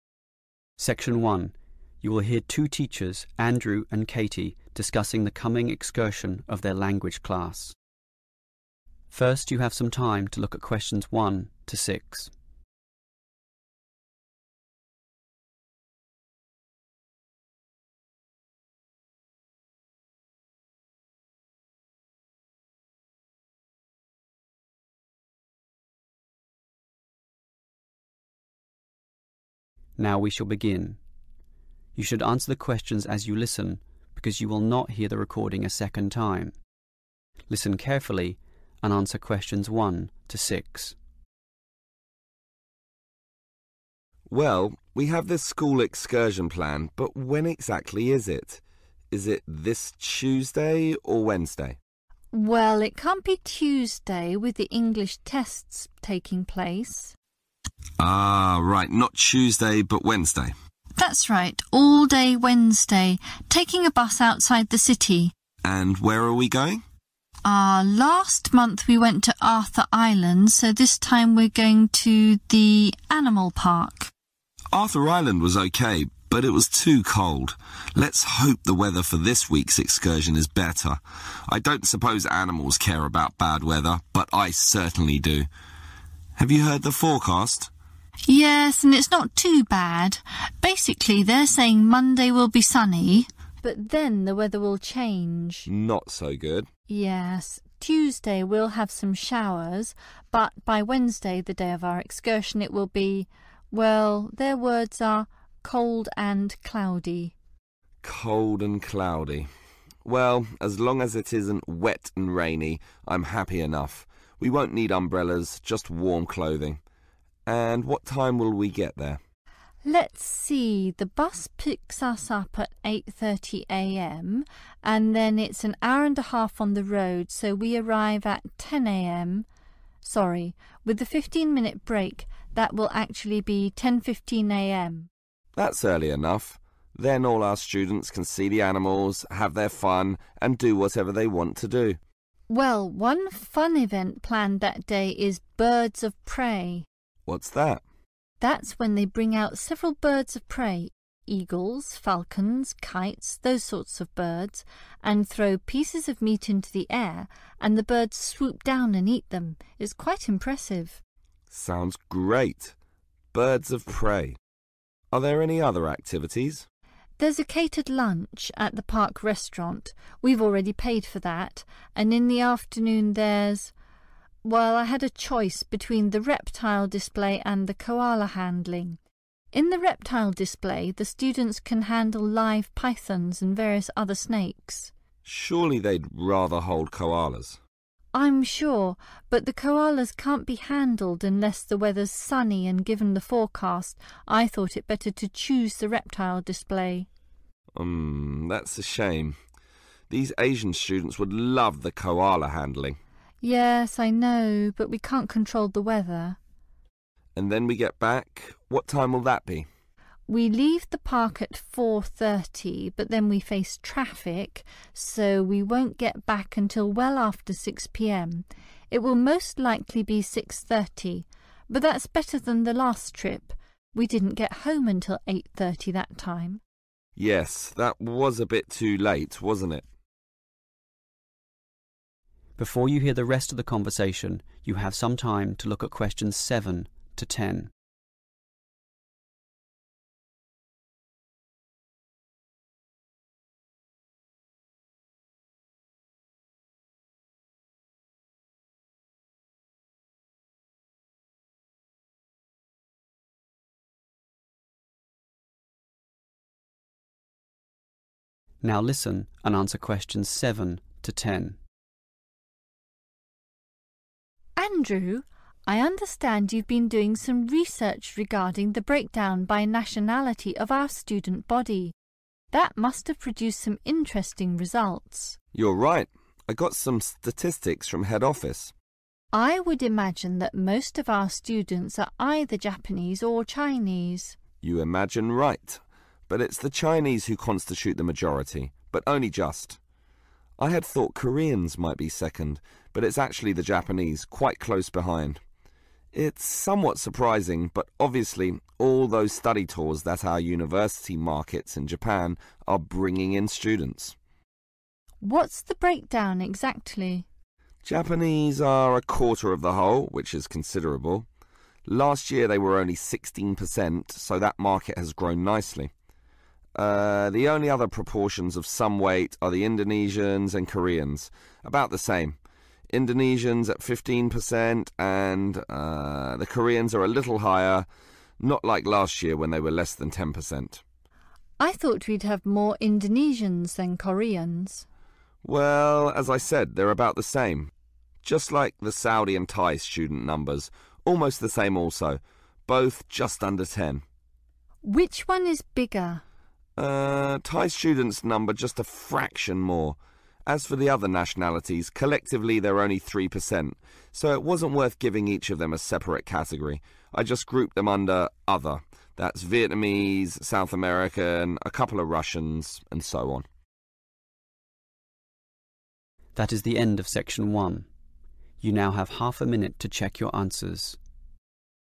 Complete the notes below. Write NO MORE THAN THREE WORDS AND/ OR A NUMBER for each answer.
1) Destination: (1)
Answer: animal park

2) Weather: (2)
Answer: cold and cloudy

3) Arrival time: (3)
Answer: 10.15 am

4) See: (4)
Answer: birds of prey

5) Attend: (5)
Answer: reptile display

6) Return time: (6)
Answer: 6.30 pm

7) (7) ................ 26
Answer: chinese

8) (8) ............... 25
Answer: japanese

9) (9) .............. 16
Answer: koreans